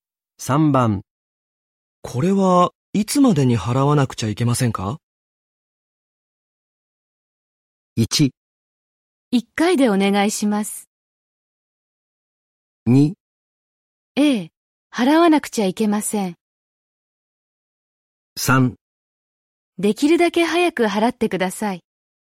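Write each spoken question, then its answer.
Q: これはいつまでに払わなくちゃいけませんか?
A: 3: できるだけ早く払ってください。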